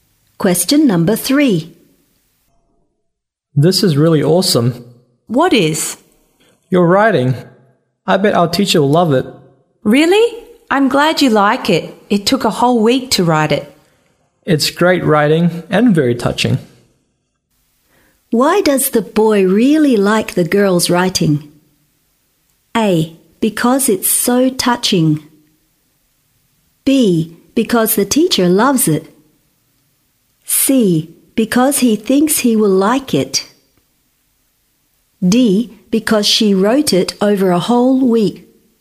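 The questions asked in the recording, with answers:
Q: Why does the boy really like the girl's writing?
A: A: Because it's so touching.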